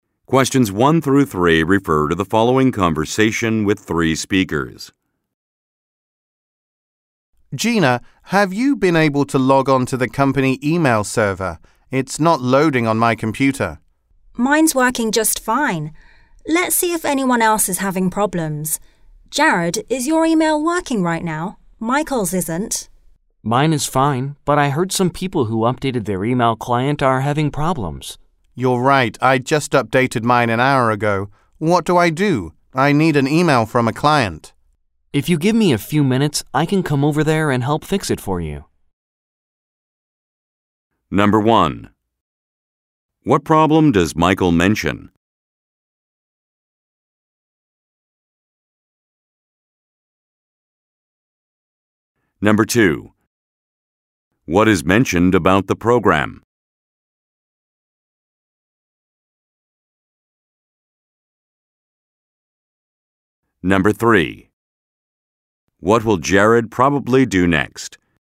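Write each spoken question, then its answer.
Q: What problem does Michael mention?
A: His company email isn't loading on his computer

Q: What is mentioned about the program?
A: People who updated their email client are having problems

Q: What will Jared probably do next?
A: Go over and help Michael fix his email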